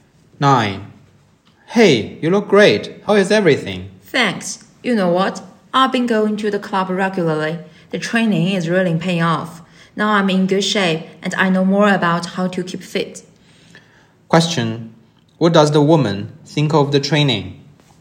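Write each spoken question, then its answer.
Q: What does the woman think of the training?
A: It is effective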